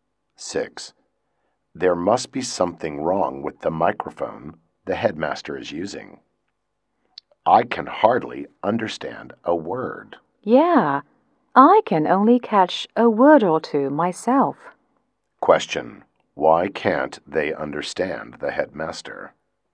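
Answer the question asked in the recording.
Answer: Something is wrong with the microphone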